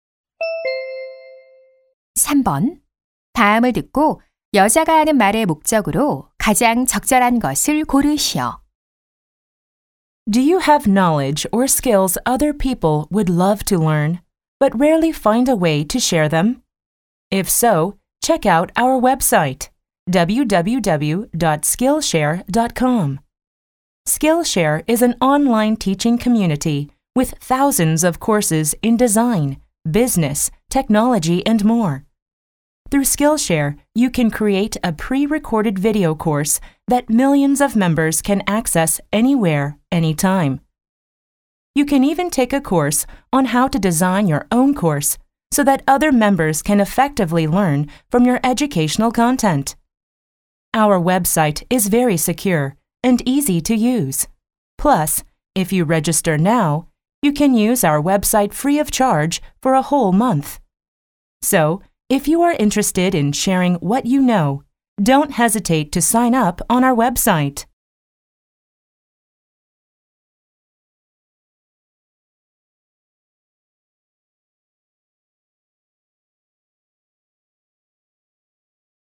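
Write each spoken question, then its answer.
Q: 다음을 듣고 여자가 하는 말의 목적으로 가장 적절한 것을 고르시오.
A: 온라인 강좌 공유 웹사이트(Skillshare) 가입을 홍보하려고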